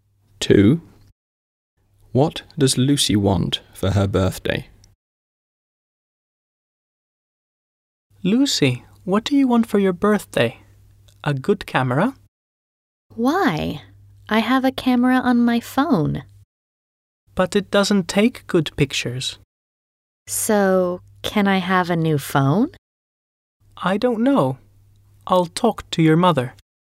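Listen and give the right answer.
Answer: a new phone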